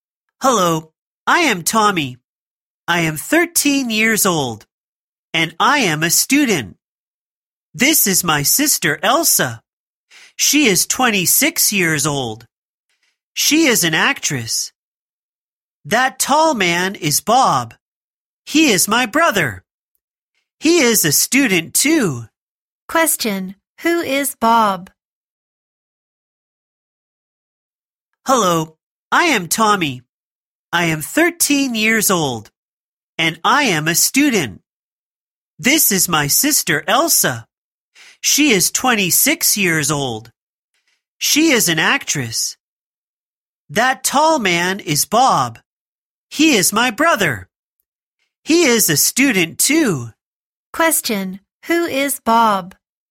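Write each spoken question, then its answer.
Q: Question, who is Bob?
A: Tommy's brother, a student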